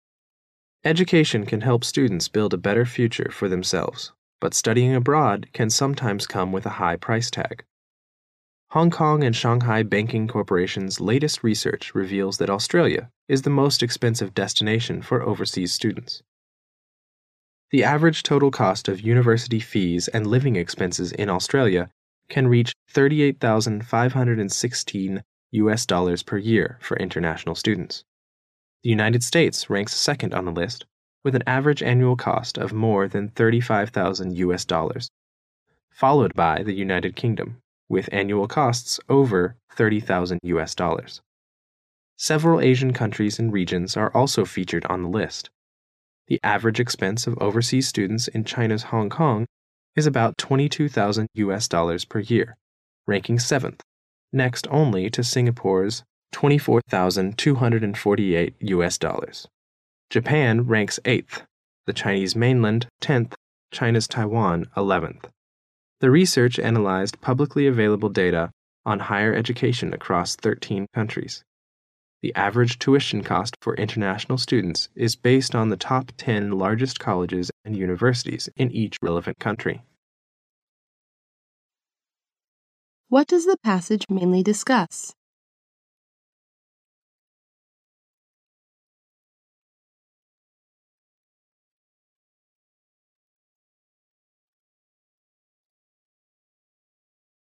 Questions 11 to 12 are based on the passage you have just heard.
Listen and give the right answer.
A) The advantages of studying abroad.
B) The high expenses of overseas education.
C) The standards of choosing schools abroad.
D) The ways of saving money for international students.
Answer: B) The high expenses of overseas education.

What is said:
A B C D B [听力原文] Education can help students build a better future for themselves, but studying abroad can sometimes come with a high price tag. Hong Kong and Shanghai Banking Corporation's latest research reveals that Australia is the most expensive destination for overseas students. The average total cost of university fees and living expenses in Australia can reach US $38,516 per year for international students. The United States ranks second on the list, with an average annual cost of more than US $35,000, followed by the United Kingdom, with annual costs over US $30,000. Several Asian countries and regions are also featured on the list. The average expense of overseas students in China's Hong Kong is about US $22,000 per year, ranking 7th, next only to Singapore's US $24,248. Japan ranks 8th, th